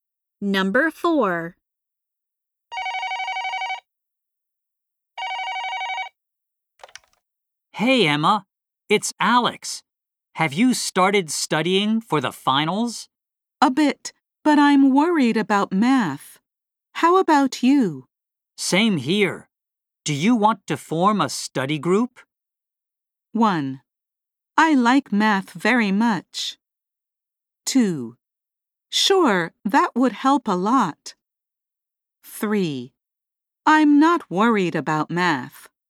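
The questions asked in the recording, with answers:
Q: Same here. Do you want to form a study group?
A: 2: Sure, that would help a lot.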